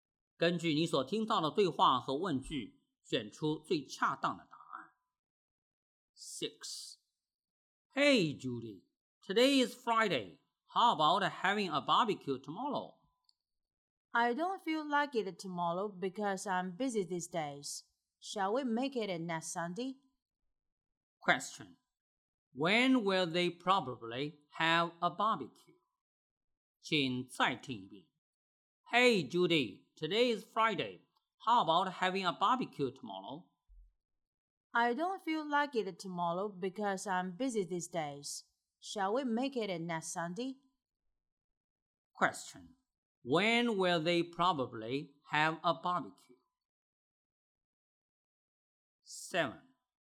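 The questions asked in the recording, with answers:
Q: When will they probably have a barbecue?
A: Next Sunday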